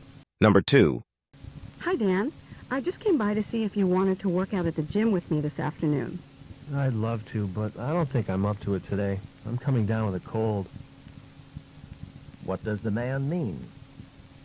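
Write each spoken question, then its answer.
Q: What does the man mean?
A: He can't go to the gym because he is getting a cold.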